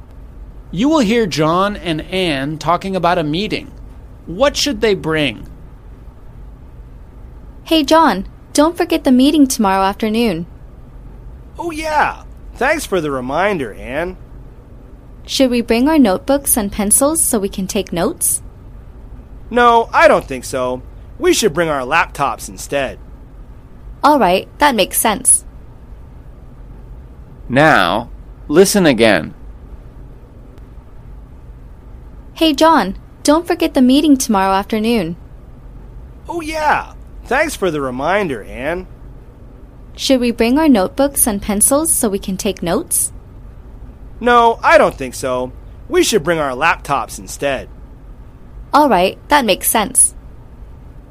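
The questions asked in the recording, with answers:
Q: What should they bring?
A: Their laptops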